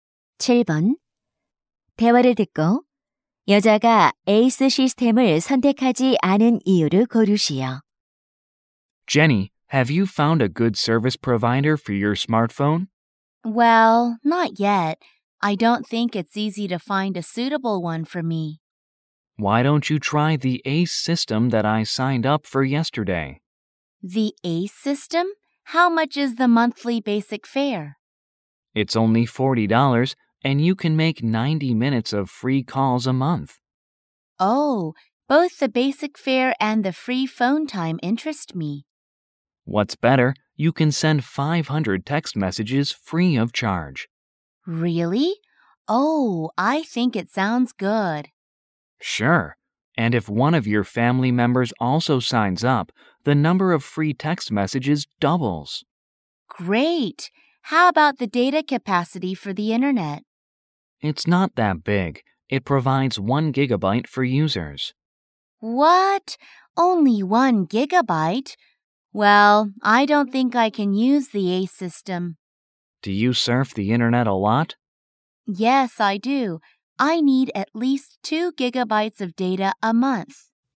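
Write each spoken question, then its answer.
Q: 대화를 듣고 여자가 에이스 시스템을 선택하지 않은 이유를 고르시오.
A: 데이터 용량(1기가바이트)이 부족해서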